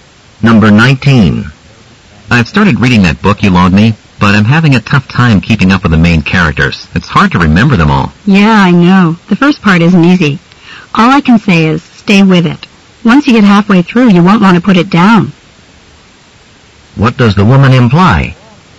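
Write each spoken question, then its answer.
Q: What does the woman imply?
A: The book gets easier and more interesting later on.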